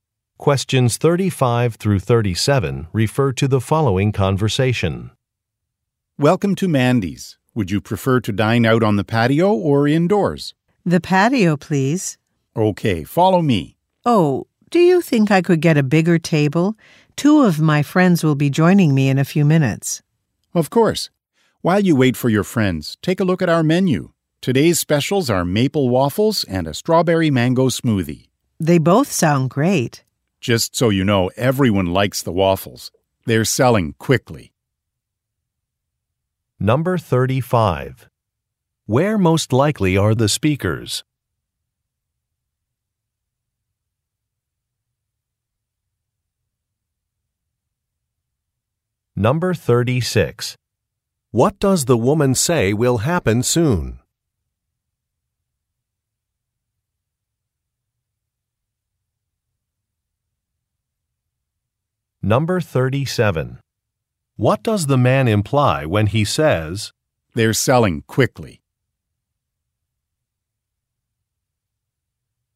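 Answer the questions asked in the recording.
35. At a restaurant
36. Two of her friends will join her
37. The woman should order the waffles soon, before they run out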